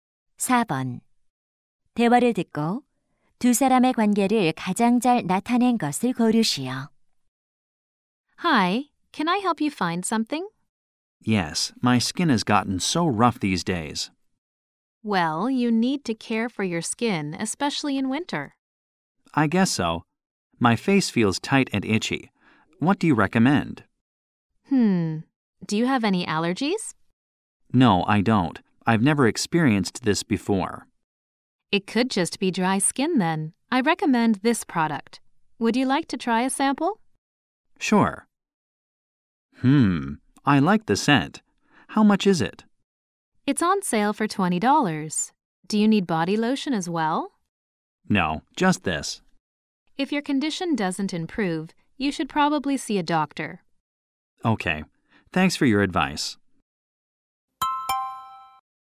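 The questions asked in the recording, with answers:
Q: 대화를 듣고 두 사람의 관계를 가장 잘 나타낸 것을 고르시오.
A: 화장품 가게 점원 - 손님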